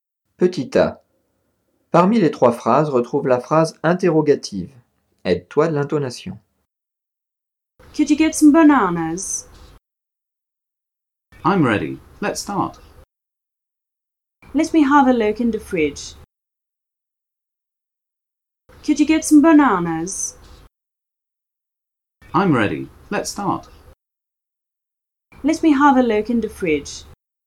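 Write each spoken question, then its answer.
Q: Parmi les 3 phrases, retrouve la phrase interrogative.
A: Could you get some bananas?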